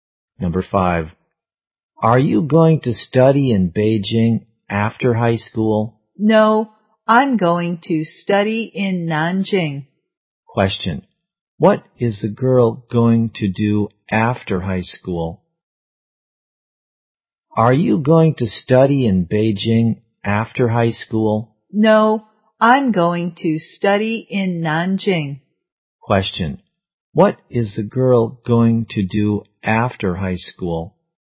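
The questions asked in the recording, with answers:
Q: Question. What is the girl going to do after high school?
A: Study in Nanjing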